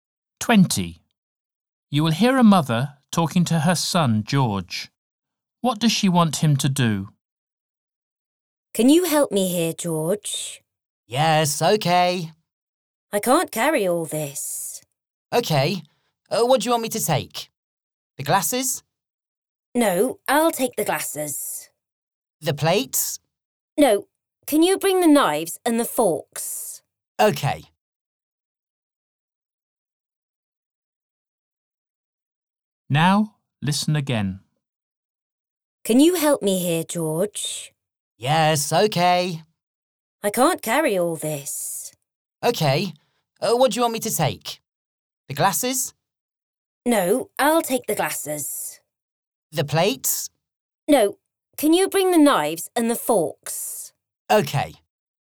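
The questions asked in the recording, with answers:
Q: What does she want him to do?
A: bring the knives and forks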